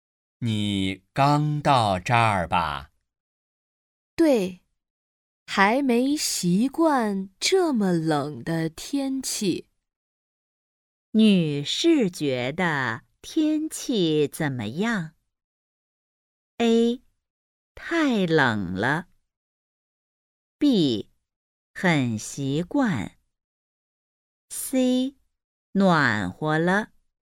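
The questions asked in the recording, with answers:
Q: 女士觉得天气怎么样?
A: A: 太冷了。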